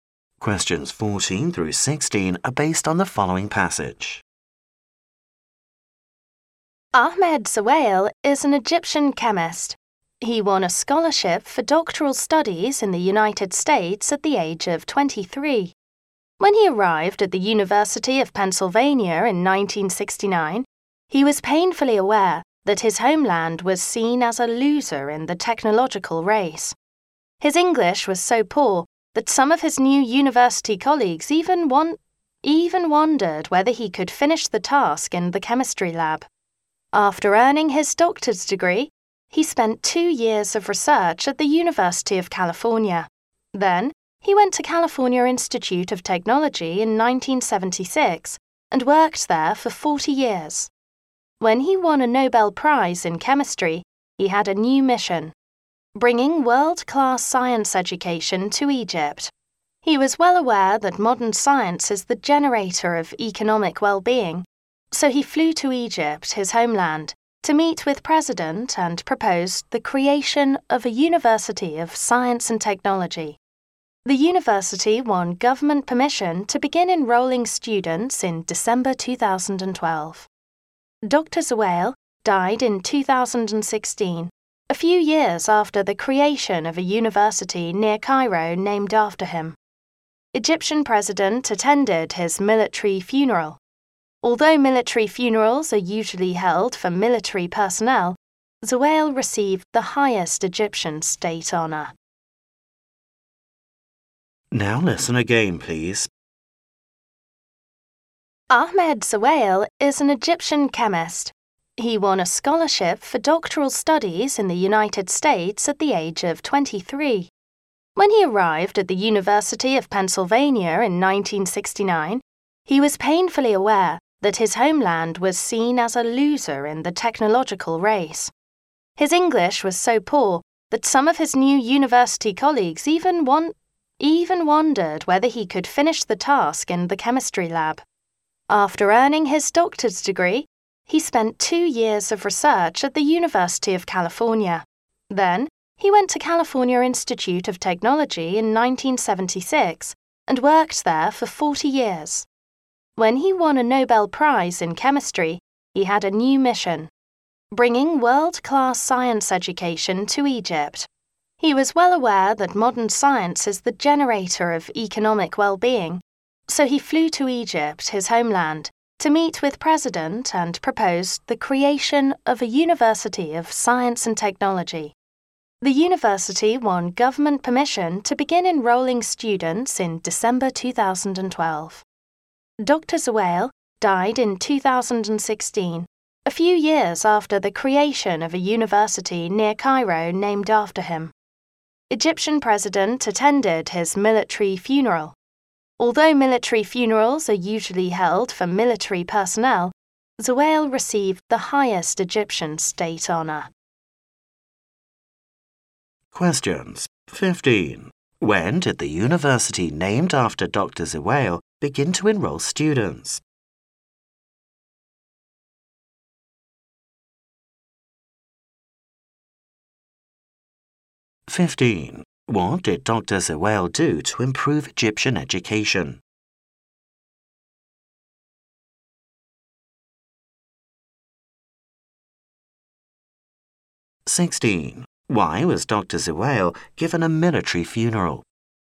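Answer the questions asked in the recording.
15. In December 2012.
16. He proposed creating a university of science and technology.
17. He received the highest Egyptian state honor.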